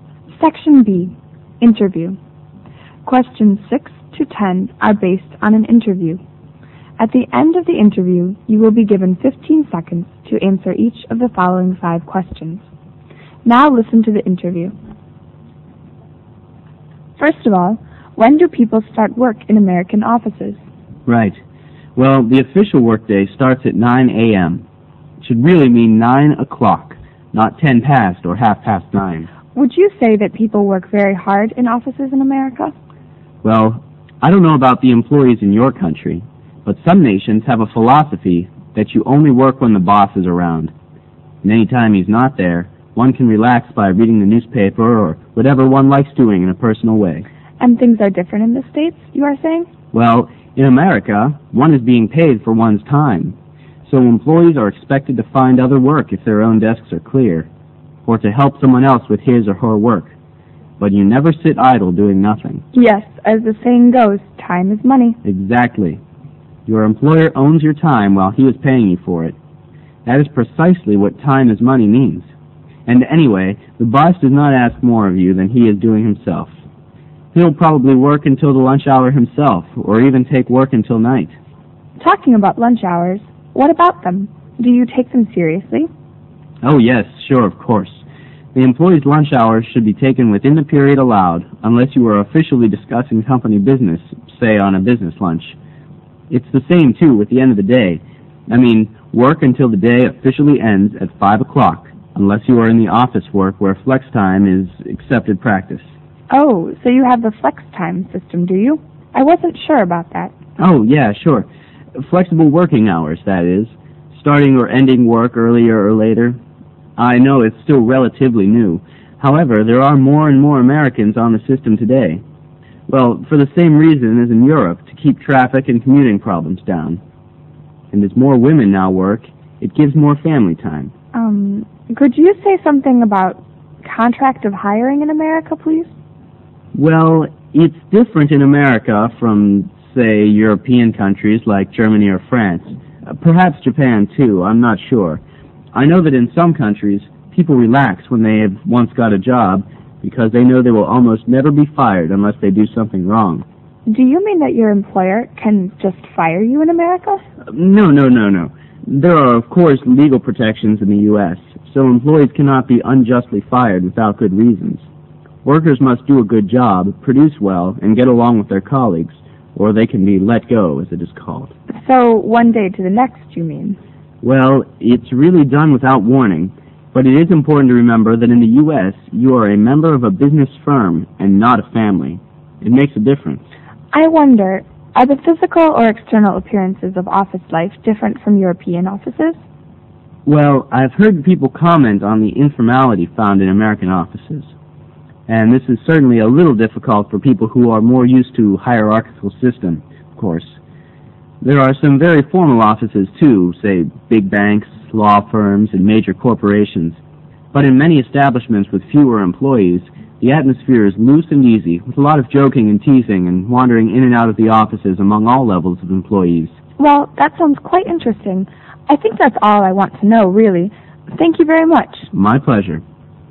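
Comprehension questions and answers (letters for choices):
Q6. Employees in the US are paid for their time. This means that they are supposed to ___.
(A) work hard while their boss is around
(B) come to work when there is work to be done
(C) work with initiative and willingness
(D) work through their lunch break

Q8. On the issue of working contracts in the US, which statement is NOT correct?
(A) Performance at work matters more than anything else.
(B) There are laws protecting employees' working rights.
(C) Good reasons must be provided in order to fire workers.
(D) Working contracts in the US are mostly short-term ones.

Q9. We can be assumed from the interview that an informal atmosphere might be found in ___.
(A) small firms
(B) major banks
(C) big corporations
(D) law offices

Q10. The interview is mainly about ___ in the USA.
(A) office hierarchies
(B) office conditions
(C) office roles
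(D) office life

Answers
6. C
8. D
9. A
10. D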